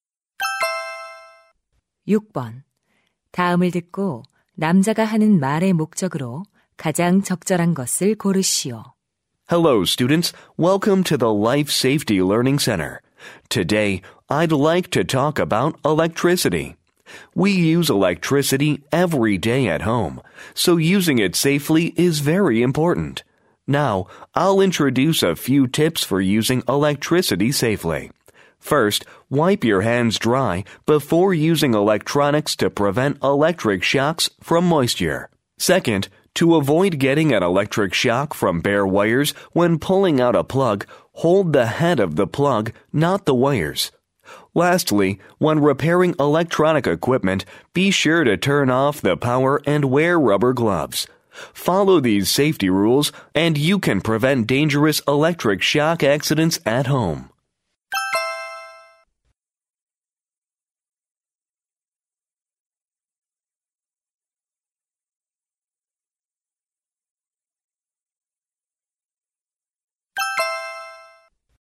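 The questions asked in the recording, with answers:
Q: 다음을 듣고 남자가 하는 말의 목적으로 가장 적절한 것을 고르시오.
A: 전기를 안전하게 사용하는 방법을 안내하려고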